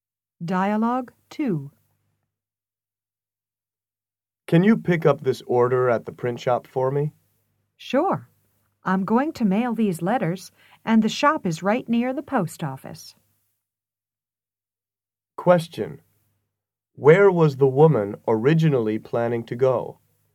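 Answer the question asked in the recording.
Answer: To the post office, to mail letters.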